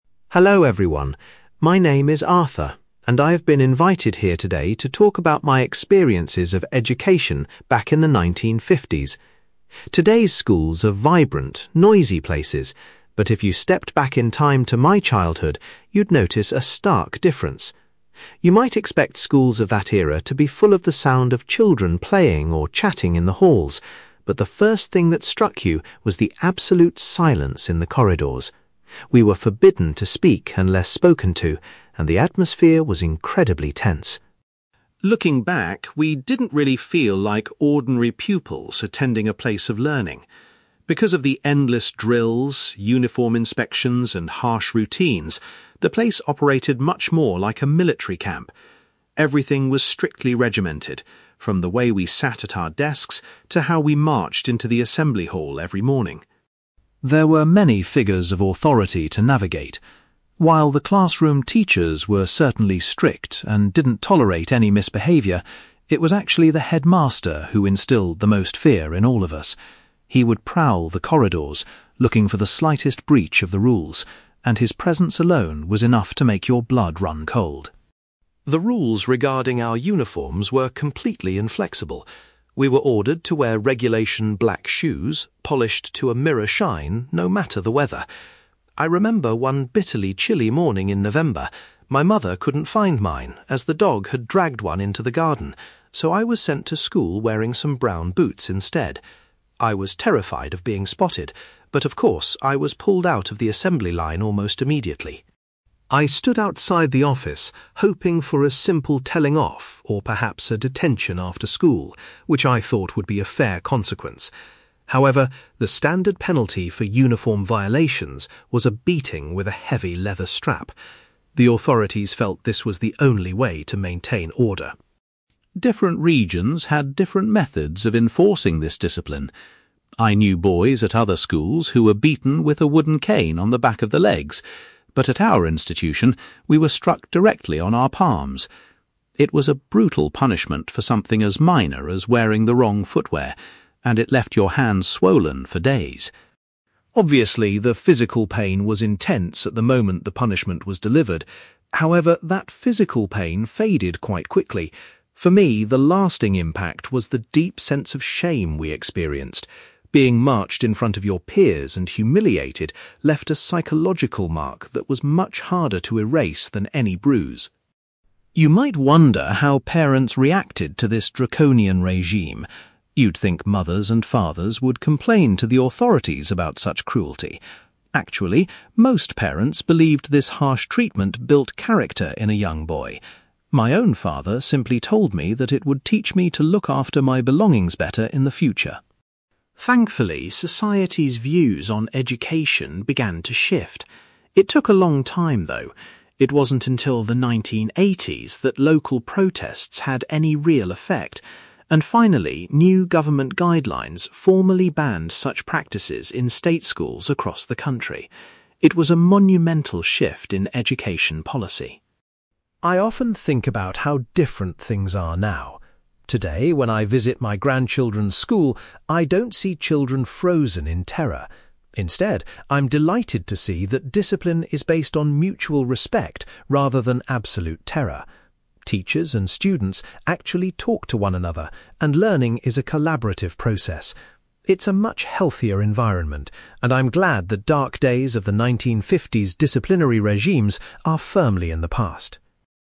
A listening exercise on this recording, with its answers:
You will hear an older man called Arthur sharing his childhood memories of school discipline in the 1950s. For questions 9-18, complete the sentences with a word or short phrase.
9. Arthur was struck by the complete (9)........................... that filled the school corridors.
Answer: silence

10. Arthur compares the way his school was run to a (10)........................... .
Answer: military camp

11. According to Arthur, the (11)........................... was the person who frightened the children the most.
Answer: headmaster

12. Arthur got into trouble for wearing (12)........................... to school one winter morning.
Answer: brown boots

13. The usual punishment for breaking the rules was being hit with a (13)........................... .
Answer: leather strap

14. Arthur explains that children at his school were hit on their (14)........................... .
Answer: palms

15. Arthur states that the feeling of (15)........................... lasted much longer than the physical pain.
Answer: shame

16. Many parents of the time believed that strict discipline was necessary to develop a child's (16)........................... .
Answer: character

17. The use of physical punishment was eventually stopped by the introduction of new (17)........................... .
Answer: government guidelines

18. Arthur is pleased that modern school discipline relies on (18)........................... rather than fear.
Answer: mutual respect

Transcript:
Arthur: Hello, everyone. My name is Arthur, and I've been invited here today to talk about my experiences of education back in the 1950s. Today's schools are vibrant, noisy places, but if you stepped back in time to my childhood, you'd notice a stark difference. You might expect schools of that era to be full of the sound of children playing or chatting in the halls, but the first thing that struck you was the absolute silence in the corridors. We were forbidden to speak unless spoken to, and the atmosphere was incredibly tense.
Looking back, we didn't really feel like ordinary pupils attending a place of learning. Because of the endless drills, uniform inspections, and harsh routines, the place operated much more like a military camp. Everything was strictly regimented, from the way we sat at our desks to how we marched into the assembly hall every morning.
There were many figures of authority to navigate. While the classroom teachers were certainly strict and didn't tolerate any misbehaviour, it was actually the headmaster who instilled the most fear in all of us. He would prowl the corridors, looking for the slightest breach of the rules, and his presence alone was enough to make your blood run cold.
The rules regarding our uniforms were completely inflexible. We were ordered to wear regulation black shoes, polished to a mirror shine, no matter the weather. I remember one bitterly chilly morning in November, my mother couldn't find mine as the dog had dragged one into the garden, so I was sent to school wearing some brown boots instead. I was terrified of being spotted, but of course, I was pulled out of the assembly line almost immediately.
I stood outside the office, hoping for a simple telling off, or perhaps a detention after school, which I thought would be a fair consequence. However, the standard penalty for uniform violations was a beating with a heavy leather strap. The authorities felt this was the only way to maintain order.
Different regions had different methods of enforcing this discipline. I knew boys at other schools who were beaten with a wooden cane on the back of the legs, but at our institution, we were struck directly on our palms. It was a brutal punishment for something as minor as wearing the wrong footwear, and it left your hands swollen for days.
Obviously, the physical pain was intense at the moment the punishment was delivered. However, that physical pain faded quite quickly; for me, the lasting impact was the deep sense of shame we experienced. Being marched in front of your peers and humiliated left a psychological mark that was much harder to erase than any bruise.
You might wonder how parents reacted to this draconian regime. You'd think mothers and fathers would complain to the authorities about such cruelty. Actually, most parents believed this harsh treatment built character in a young boy. My own father simply told me that it would teach me to look after my belongings better in the future.
Thankfully, society's views on education began to shift. It took a long time, though. It wasn't until the 1980s that local protests had any real effect, and finally, new government guidelines formally banned such practices in state schools across the country. It was a monumental shift in education policy.
I often think about how different things are now. Today, when I visit my grandchildren's school, I don't see children frozen in terror. Instead, I'm delighted to see that discipline is based on mutual respect rather than absolute terror. Teachers and students actually talk to one another, and learning is a collaborative process. It's a much healthier environment, and I'm glad the dark days of the 1950s disciplinary regimes are firmly in the past.

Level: B2